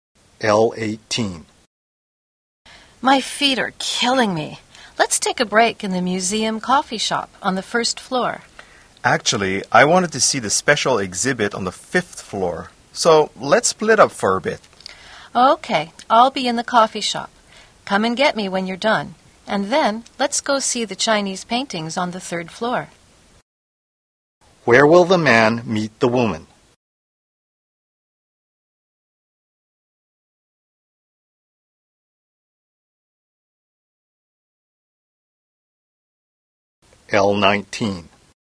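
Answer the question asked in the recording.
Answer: In the museum coffee shop on the first floor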